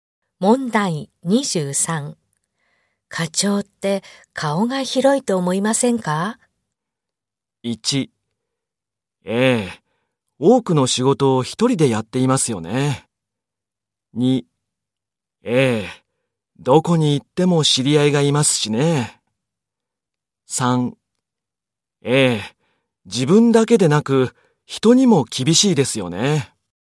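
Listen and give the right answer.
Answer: 2: ええ、どこに行っても知り合いがいますしね。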